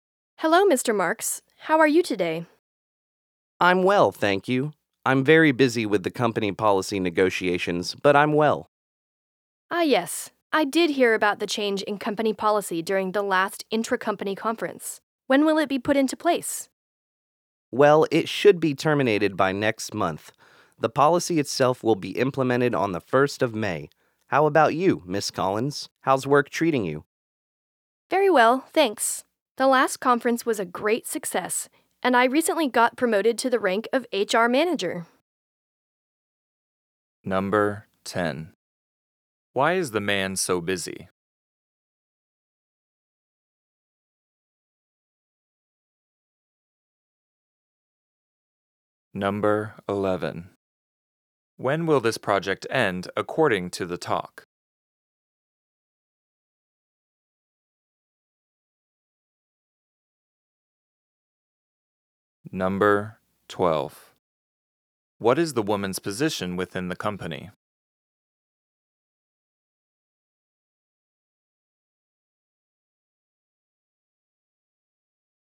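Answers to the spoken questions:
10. He is busy with the company policy negotiations.
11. By next month.
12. HR manager.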